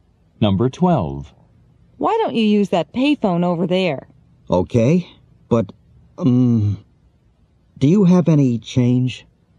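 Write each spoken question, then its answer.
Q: What does the man ask the woman?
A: Whether she has any change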